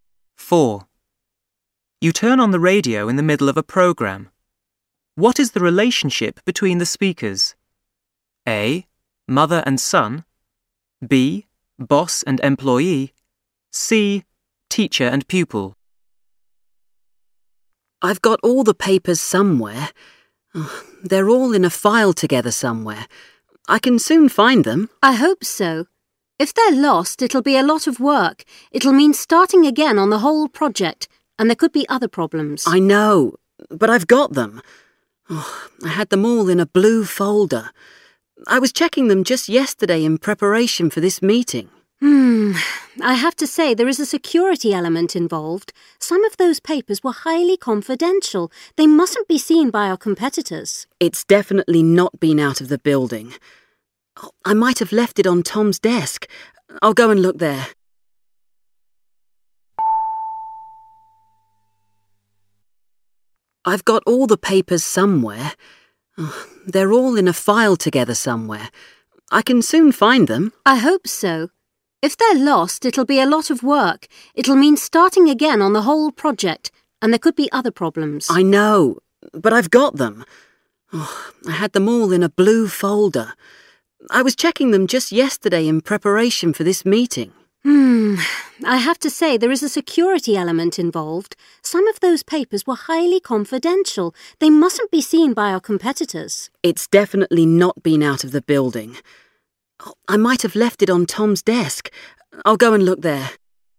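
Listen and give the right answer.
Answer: B: Boss and employee.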